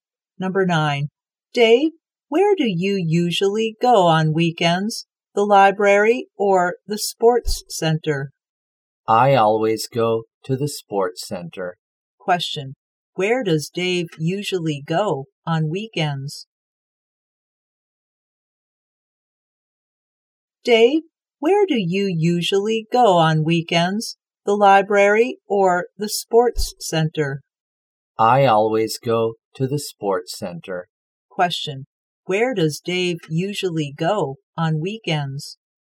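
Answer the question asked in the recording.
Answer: The sports center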